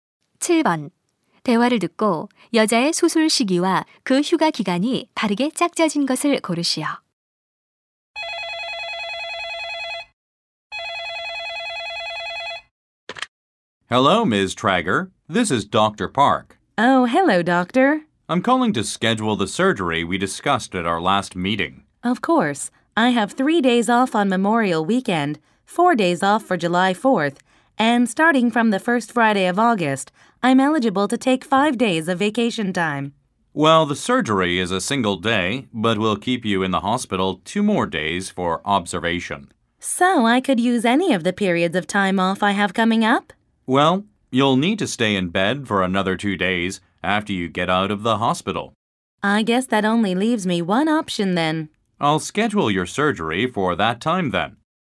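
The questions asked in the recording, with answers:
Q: 대화를 듣고 여자의 수술 시기와 그 휴가 기간이 바르게 짝짜진 것을 고르시오.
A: 8월 첫째 금요일부터, 5일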